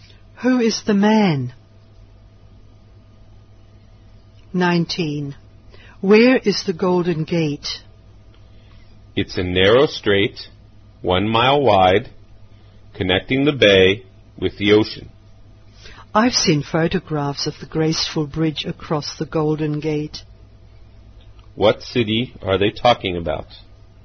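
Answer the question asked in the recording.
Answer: San Francisco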